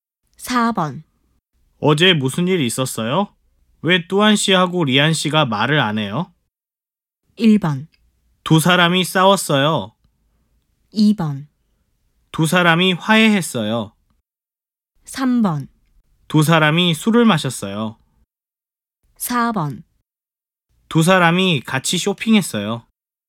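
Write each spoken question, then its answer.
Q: 어제 무슨 일 있었어요? 왜 뚜안 씨하고 리안 씨가 말을 안 해요?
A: 1: 두 사람이 싸웠어요.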